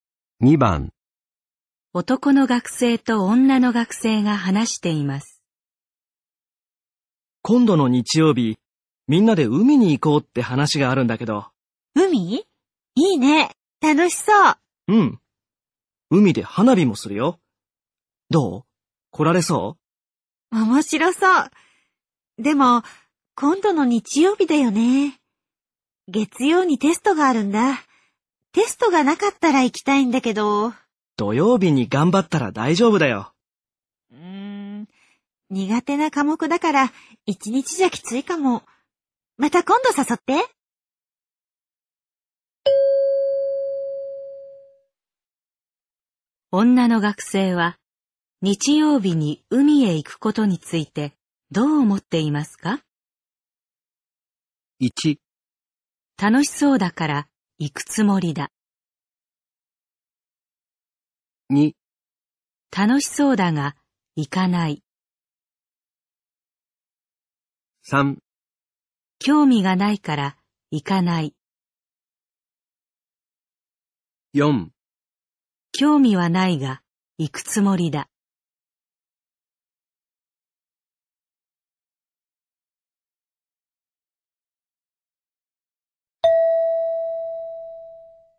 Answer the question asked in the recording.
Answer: 2

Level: N3 Listening · Test 15